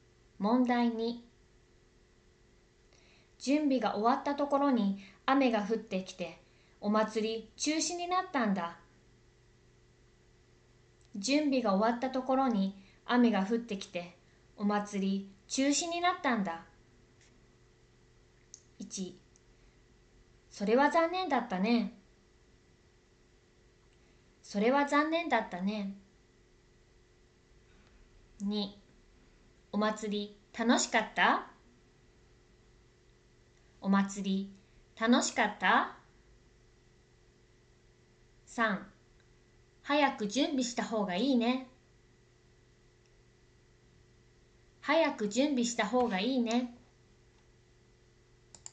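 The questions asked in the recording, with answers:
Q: 準備が終わったところに雨が降ってきて、お祭り中止になったんだ。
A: 1: それは残念だったね。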